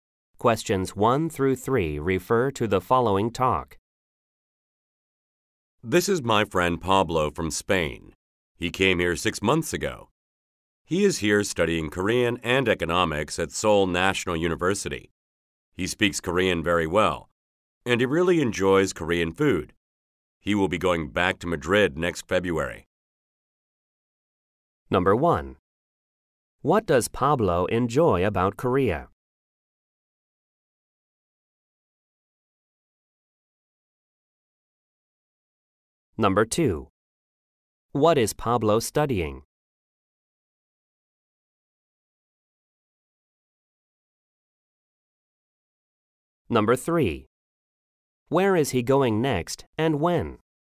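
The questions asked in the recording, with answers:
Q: What does Pablo enjoy about Korea?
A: Korean food

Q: What is Pablo studying?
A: Korean and economics

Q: Where is he going next and when?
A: To Madrid next February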